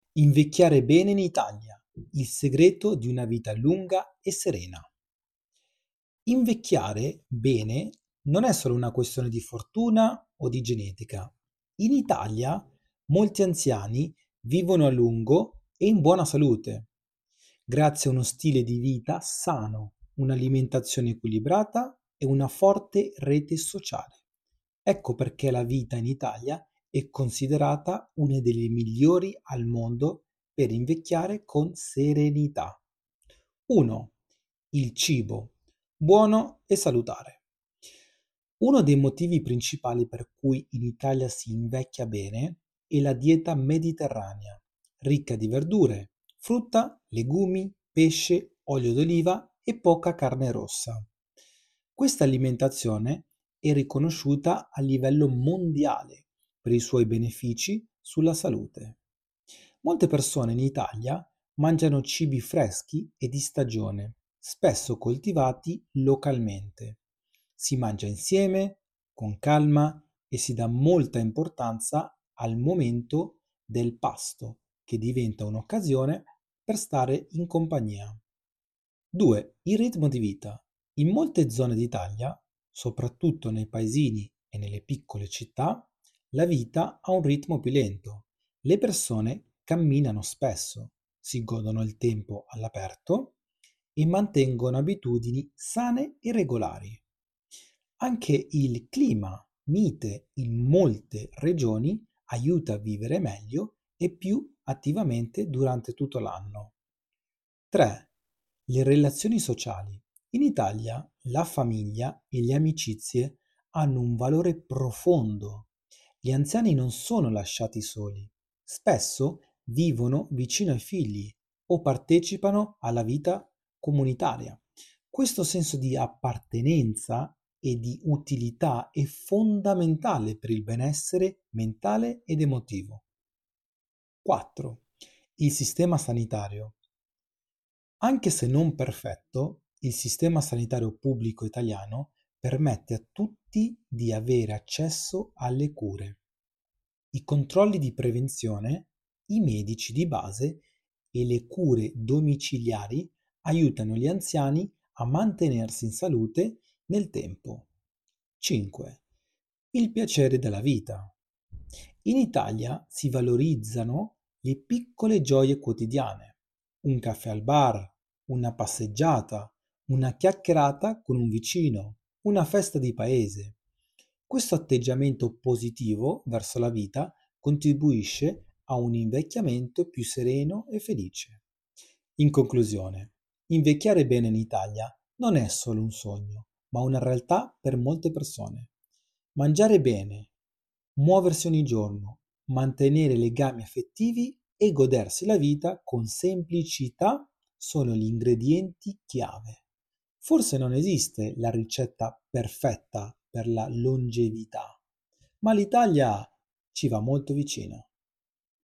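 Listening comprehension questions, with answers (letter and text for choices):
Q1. Qual è una delle caratteristiche principali della dieta mediterranea?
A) Alto consumo di zuccheri raffinati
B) Uso frequente di olio d'oliva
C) Grandi quantità di carne rossa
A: B) Uso frequente di olio d'oliva

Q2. Quale alimento è tipico della dieta mediterranea?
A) Patatine fritte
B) Frutta fresca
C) Bibite gassate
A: B) Frutta fresca

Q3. Cosa favorisce il benessere mentale negli anziani in Italia?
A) Lavorare fino a 80 anni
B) L'isolamento sociale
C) Avere relazioni familiari e sociali forti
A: C) Avere relazioni familiari e sociali forti

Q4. Qual è un'abitudine salutare comune nelle zone rurali italiane?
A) Camminare ogni giorno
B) Guardare la TV per ore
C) Mangiare fast food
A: A) Camminare ogni giorno

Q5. Perché il clima italiano favorisce l'invecchiamento sano?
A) Permette di passare molto tempo all'aperto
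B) Fa sempre molto freddo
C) Costringe a stare in casa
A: A) Permette di passare molto tempo all'aperto

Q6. Qual è uno dei benefici della vita in un piccolo paese italiano?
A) Inquinamento alto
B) Traffico intenso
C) Vita più tranquilla e relazioni strette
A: C) Vita più tranquilla e relazioni strette

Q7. Quale tra questi cibi è considerato sano nella dieta mediterranea?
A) Legumi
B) Dolci industriali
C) Patatine in sacchetto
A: A) Legumi

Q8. Perché l'Italia è considerata un buon Paese per invecchiare?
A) Non ci sono ospedali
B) La gente non cucina mai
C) Si mangia bene e si vive con calma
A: C) Si mangia bene e si vive con calma

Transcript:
Invecchiare bene non è solo una questione di fortuna o di genetica. In Italia, molti anziani vivono a lungo e in buona salute, grazie a uno stile di vita sano, un'alimentazione equilibrata e una forte rete sociale. Ecco perché la vita in Italia è considerata una delle migliori al mondo per invecchiare con serenità.
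1. Il Cibo: Buono e Salutare
Uno dei motivi principali per cui in Italia si invecchia bene è la dieta mediterranea. Ricca di verdure, frutta, legumi, pesce, olio d'oliva e poca carne rossa, questa alimentazione è riconosciuta a livello mondiale per i suoi benefici sulla salute.
Molte persone in Italia mangiano cibi freschi e di stagione, spesso coltivati localmente. Si mangia insieme, con calma, e si dà molta importanza al momento del pasto, che diventa un'occasione per stare in compagnia.
2. Il Ritmo di Vita
In molte zone d'Italia, soprattutto nei paesi e nelle piccole città, la vita ha un ritmo più lento. Le persone camminano spesso, si godono il tempo all'aperto, e mantengono abitudini sane e regolari. Anche il clima mite in molte regioni aiuta a vivere meglio e più attivamente durante tutto l'anno.
3. Le Relazioni Sociali
In Italia, la famiglia e le amicizie hanno un valore profondo. 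Gli anziani non sono lasciati soli: spesso vivono vicino ai figli o partecipano alla vita comunitaria. Questo senso di appartenenza e di utilità è fondamentale per il benessere mentale ed emotivo.
4. Il Sistema Sanitario
Anche se non perfetto, il sistema sanitario pubblico italiano permette a tutti di avere accesso alle cure. I controlli di prevenzione, i medici di base e le cure domiciliari aiutano gli anziani a mantenersi in salute nel tempo.
5. Il Piacere della Vita
In Italia si valorizzano le piccole gioie quotidiane: un caffè al bar, una passeggiata, una chiacchierata con un vicino, una festa di paese. Questo atteggiamento positivo verso la vita contribuisce a un invecchiamento più sereno e felice.
Conclusione
Invecchiare bene in Italia non è solo un sogno, ma una realtà per molte persone. Mangiare bene, muoversi ogni giorno, mantenere legami affettivi e godersi la vita con semplicità sono gli ingredienti chiave. 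Forse non esiste la ricetta perfetta per la longevità, ma l'Italia ci va molto vicino.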